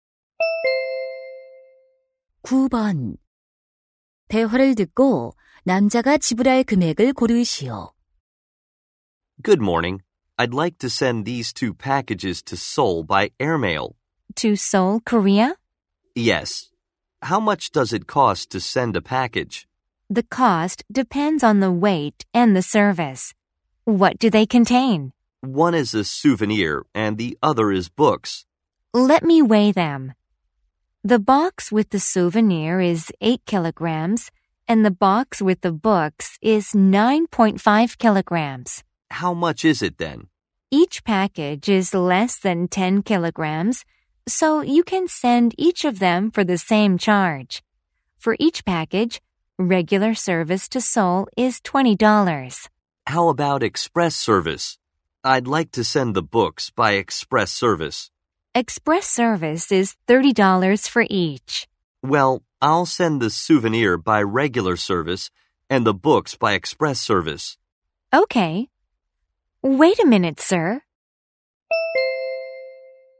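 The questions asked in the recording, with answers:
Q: 대화를 듣고 남자가 지불할 금액을 고르시오.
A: 50달러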